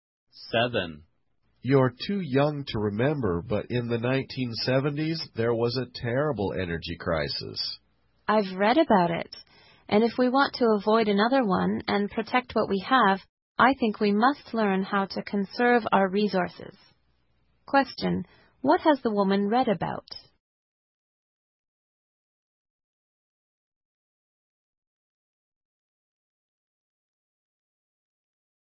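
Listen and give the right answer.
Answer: The energy crisis of the 1970s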